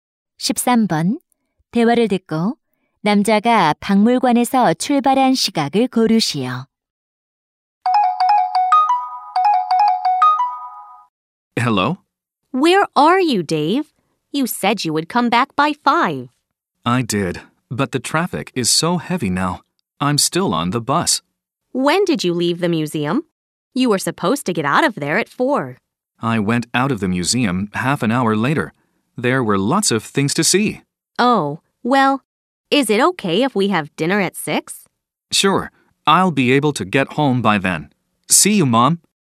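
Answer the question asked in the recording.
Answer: 4시 30분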